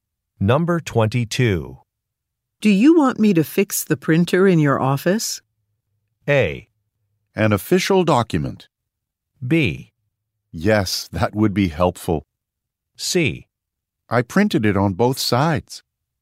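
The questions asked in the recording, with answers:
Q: Do you want me to fix the printer in your office?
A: B: Yes, that would be helpful.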